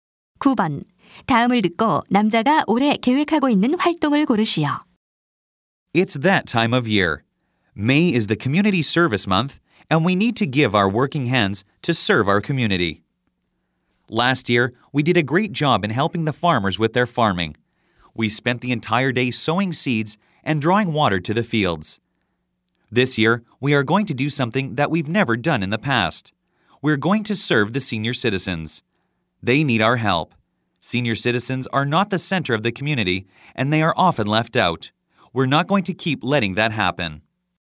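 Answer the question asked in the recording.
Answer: 노인 돕기 봉사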